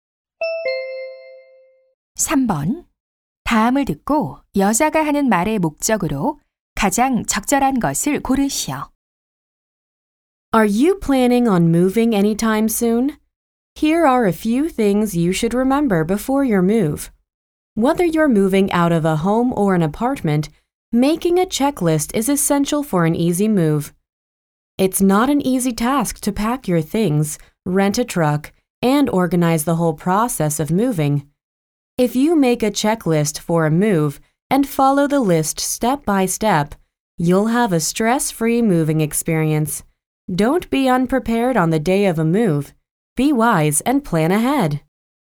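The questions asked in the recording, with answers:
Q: 다음을 듣고 여자가 하는 말의 목적으로 가장 적절한 것을 고르시오.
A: 이사 전에 체크리스트를 만들 것을 권하려고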